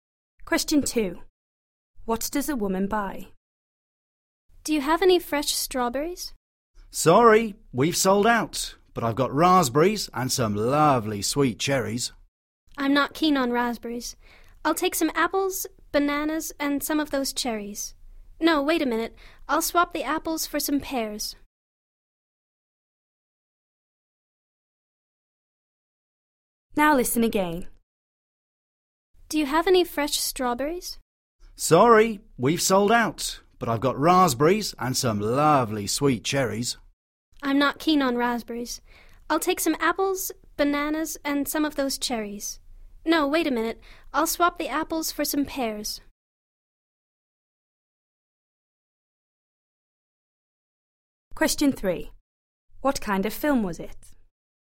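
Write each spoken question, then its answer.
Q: What does a woman buy?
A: Bananas, cherries and pears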